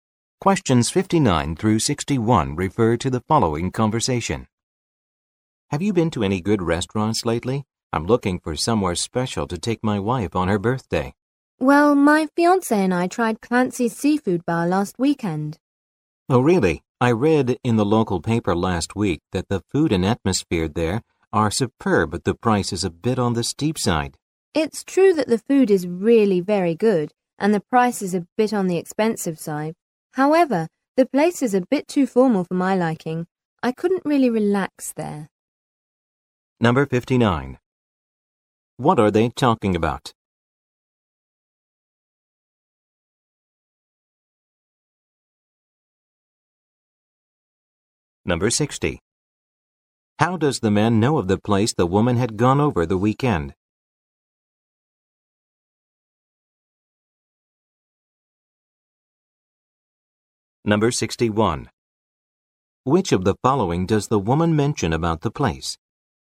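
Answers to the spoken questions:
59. Restaurants
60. He read about it in the local paper
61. It is too formal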